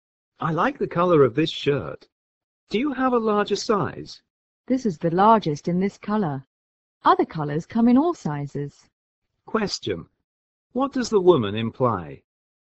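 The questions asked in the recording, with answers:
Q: What does the woman imply?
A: There's no larger size in this color; the man would have to pick another color to get a larger size.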